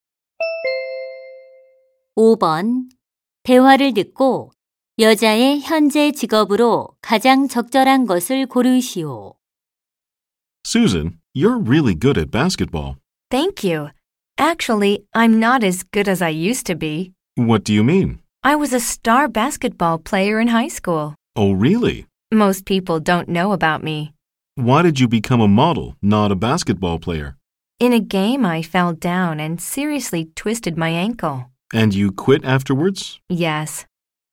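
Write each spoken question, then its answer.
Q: 대화를 듣고 여자의 현재 직업으로 가장 적절한 것을 고르시오.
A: 모델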